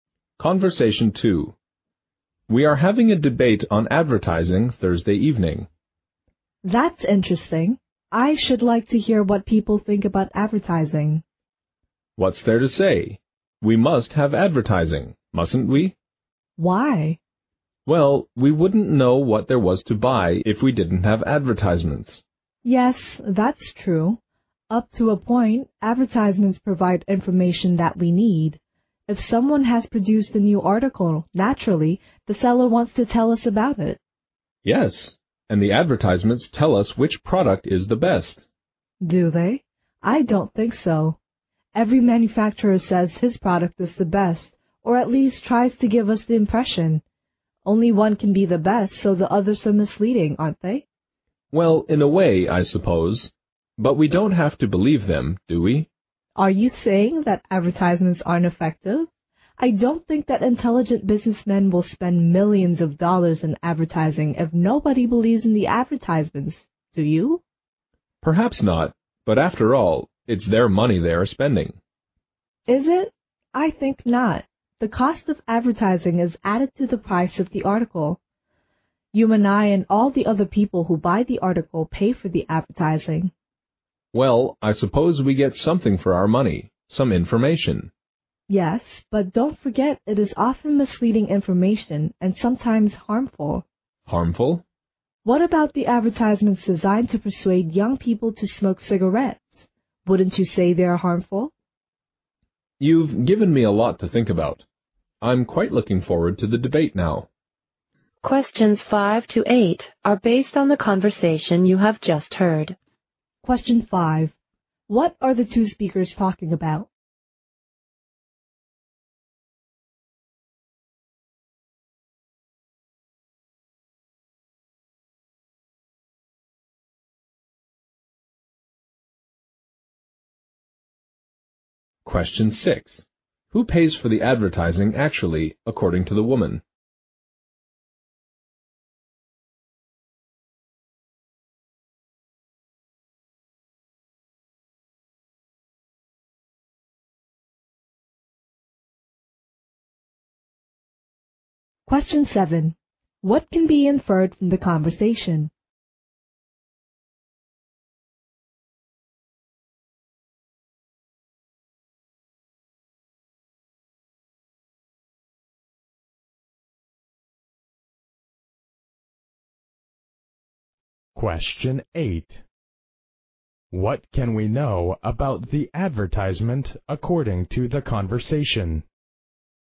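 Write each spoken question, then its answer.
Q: What are the two speakers talking about?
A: Advertising, in preparation for a debate on advertising on Thursday evening

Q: Who pays for the advertising actually, according to the woman?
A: The people who buy the article (the consumers)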